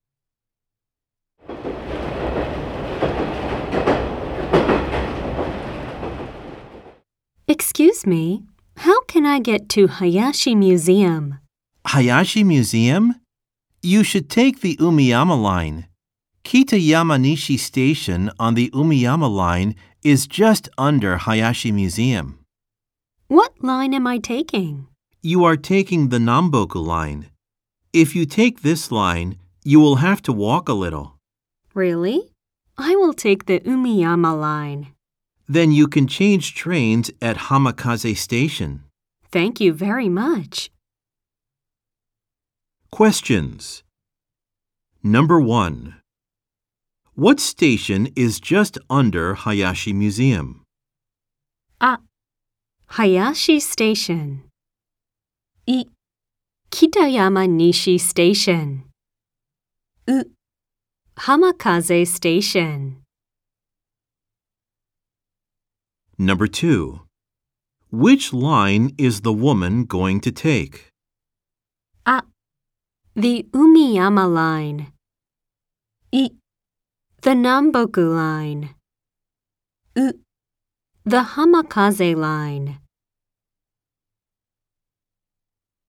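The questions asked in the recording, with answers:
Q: What station is just under Hayashi Museum?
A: い: Kitayama Nishi Station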